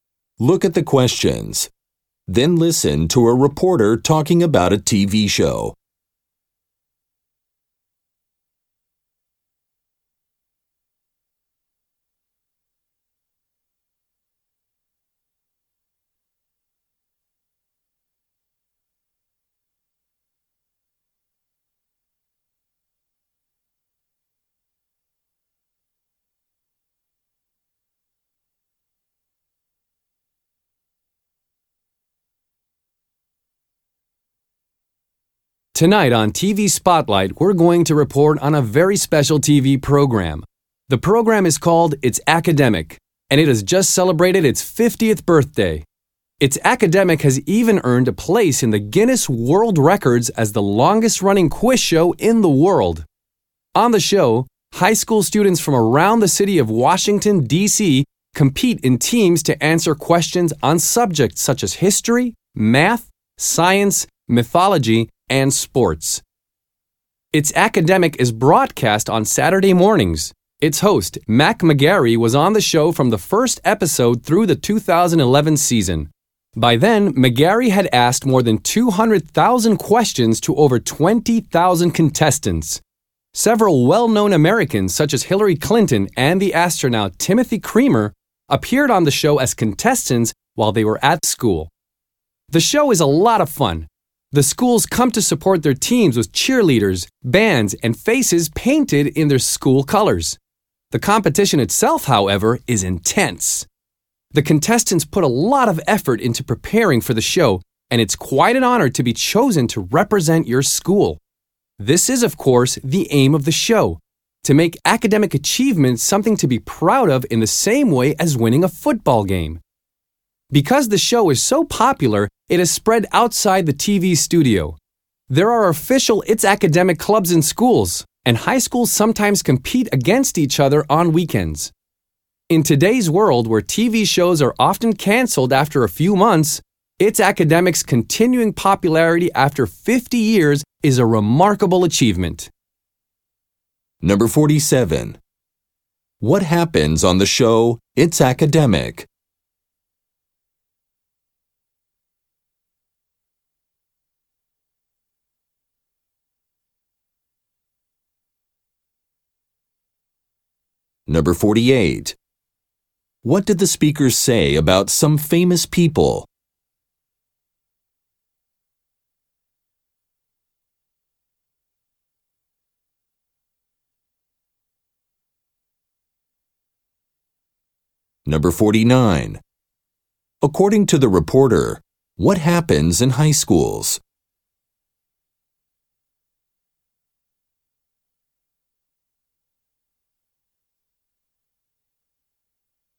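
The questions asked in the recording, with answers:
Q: What happens on the show It's Academic?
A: High school teams compete to answer quiz questions

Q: What did the speakers say about some famous people?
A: They were contestants on the show when they were at school

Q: According to the reporter, what happens in high schools?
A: There are It's Academic clubs and schools compete on weekends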